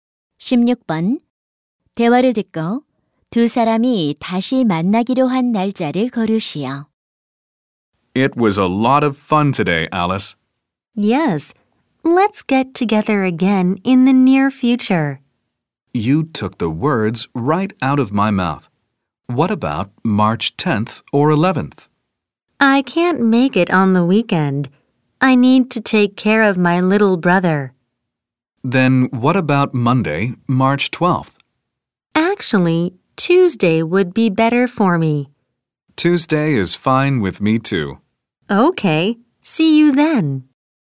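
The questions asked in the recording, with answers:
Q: 대화를 듣고 두 사람이 다시 만나기로 한 날짜를 거르시오.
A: 3월 13일 화요일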